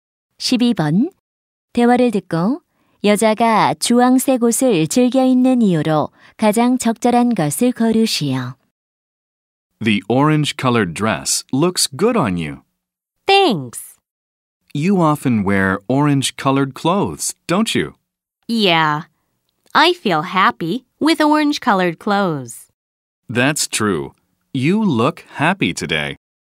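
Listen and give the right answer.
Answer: 입으면 행복해서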